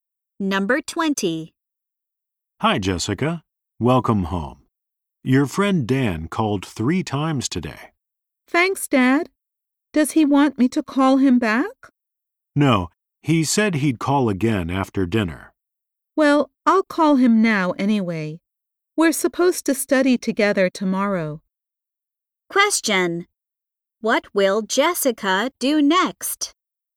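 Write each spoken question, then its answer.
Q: What will Jessica do next?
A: Call Dan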